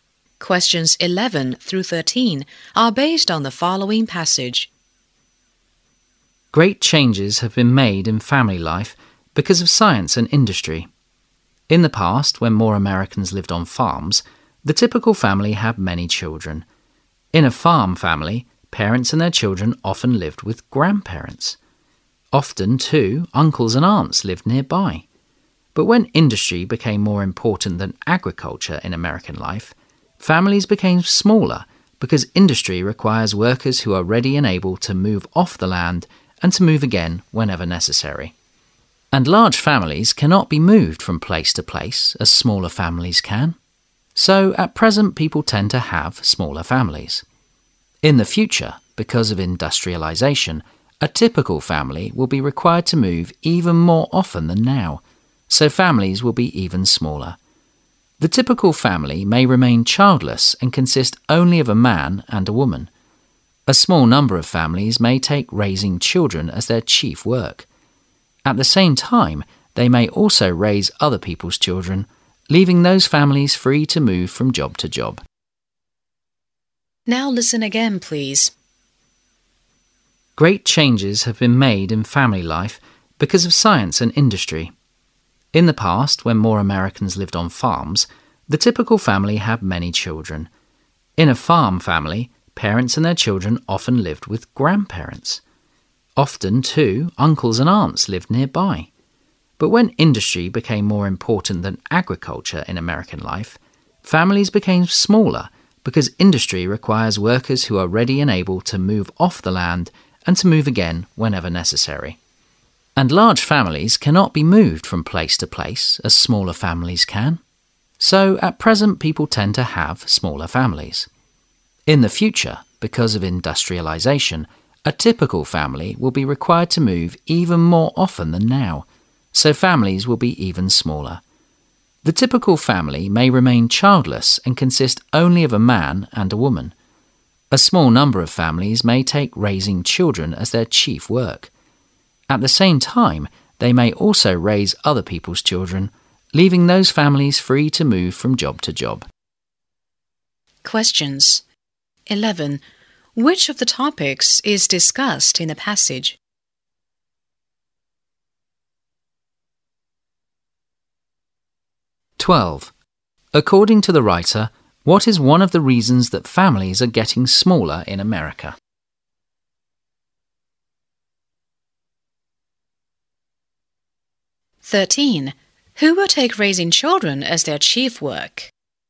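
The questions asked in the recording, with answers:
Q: According to the writer, what is one of the reasons that families are getting smaller in America?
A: Industry requires workers who can move often

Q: Who will take raising children as their chief work?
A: A small number of families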